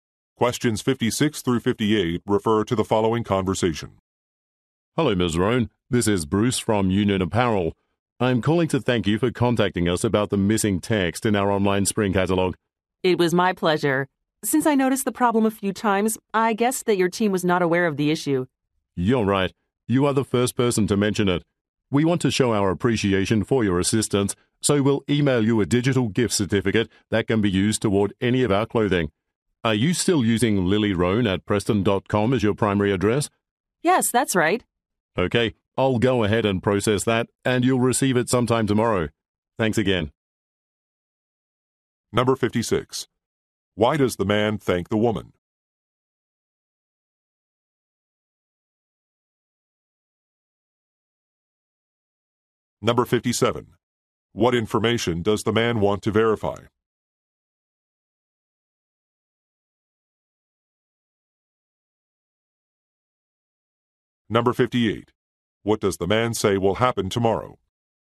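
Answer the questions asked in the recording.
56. She reported missing text in the online catalog
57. Her email address
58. She will receive a gift certificate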